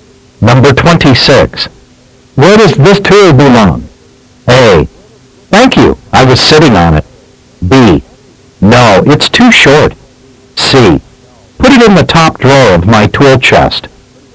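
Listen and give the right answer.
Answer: C: Put it in the top drawer of my tool chest.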